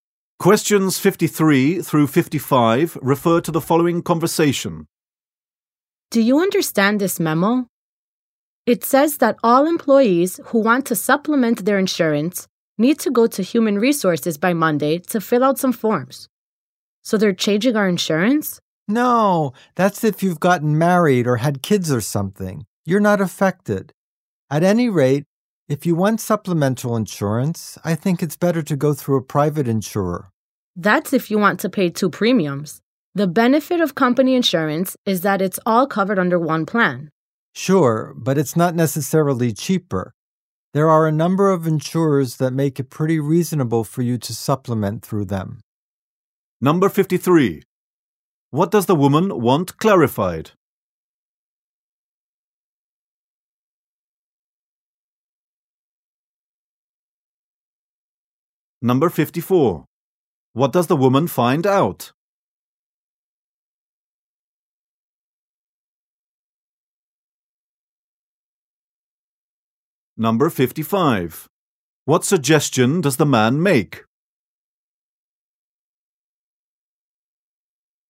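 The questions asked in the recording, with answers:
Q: What does the woman want clarified?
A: A memo about insurance

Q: What does the woman find out?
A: She is not affected by the memo

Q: What suggestion does the man make?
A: Get supplemental insurance through a private insurer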